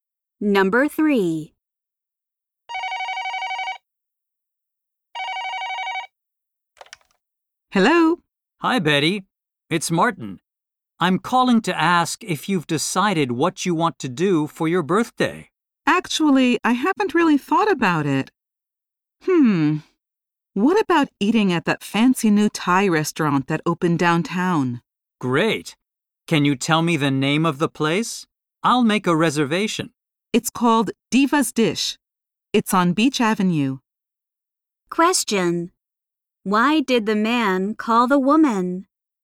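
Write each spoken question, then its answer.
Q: Why did the man call the woman?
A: To ask what she wants to do for her birthday.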